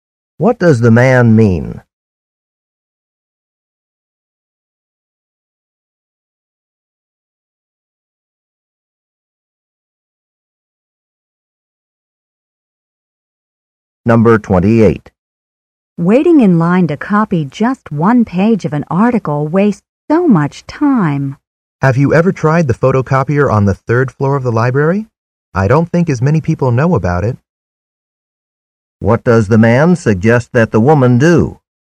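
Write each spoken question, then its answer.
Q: What does the man suggest that the woman do?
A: Use the photocopier on the library's third floor.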